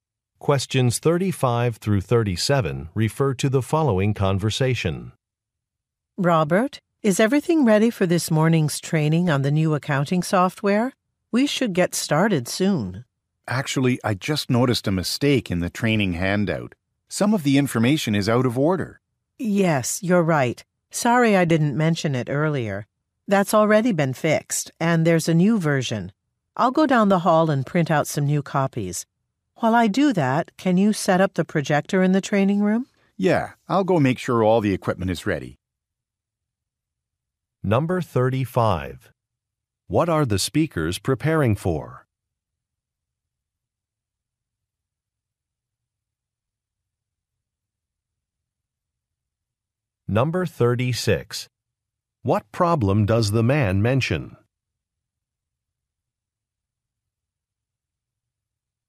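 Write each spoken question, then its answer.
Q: What are the speakers preparing for?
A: A training session on new accounting software

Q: What problem does the man mention?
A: A mistake in the training handout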